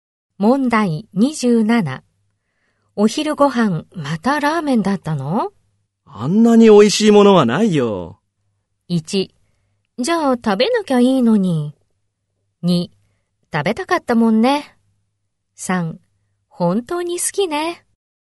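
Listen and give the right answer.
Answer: 3: 本当に好きね。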